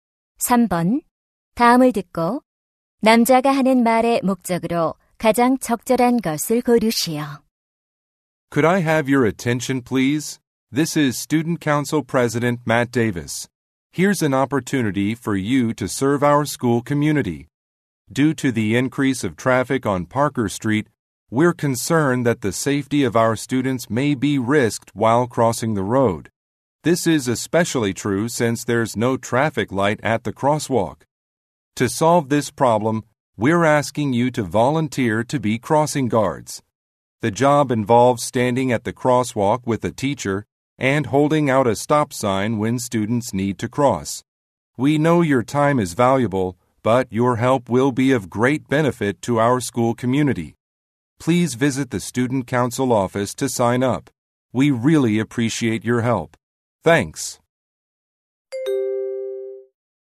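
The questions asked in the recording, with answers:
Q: 다음을 듣고 남자가 하는 말의 목적으로 가장 적절한 것을 고르시오.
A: 교통안전 지도 자원봉사자를 모집하려고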